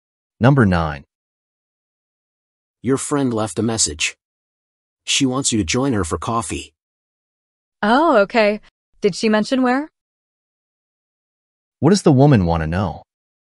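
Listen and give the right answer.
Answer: Where her friend wants to meet for coffee.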